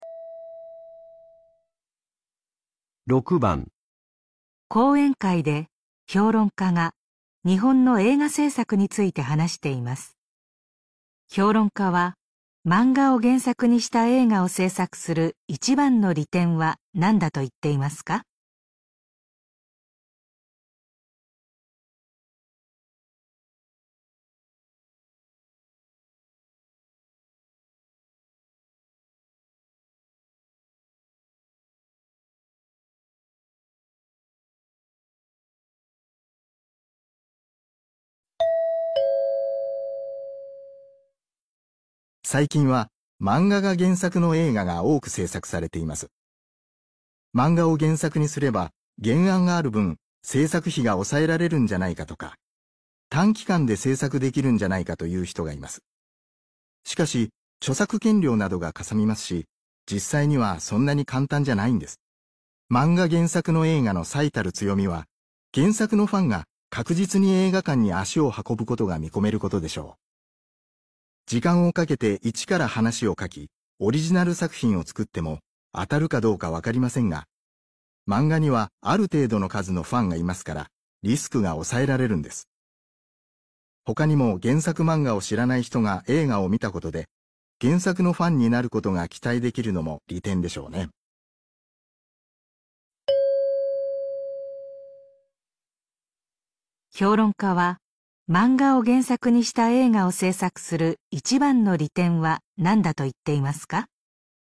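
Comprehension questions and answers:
评论家说,制作漫画改编的电影最大的优势是什么?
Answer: 可以确定原作的粉丝会去电影院观看

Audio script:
講演会で評論家が日本の映画制作について話しています。評論家は漫画を原作にした映画を制作する一番の利点は何だと言っていますか。
男:最近は漫画が原作の映画が多く制作されています。
漫画を原作にすれば原案がある分、製作費が抑えられるんじゃないのとか、短期間で制作できるんじゃないか、という人がいます。
しかし、著作権料などが嵩みますし、実際にはそんなに簡単じゃないんです。
漫画原作の映画の最たる強みは原作のファンが確実に映画館に足を運ぶことが見込めることでしょう。
時間をかけて一から話を書き、オリジナル作品を作っても当たるかどうかわかりませんが、漫画にはある程度の数のファンがいますからリスクが抑えられるんです。
他にも原作漫画を知らない人が映画を見たことで原作のファンになることが期待できるのも利点でしょうね。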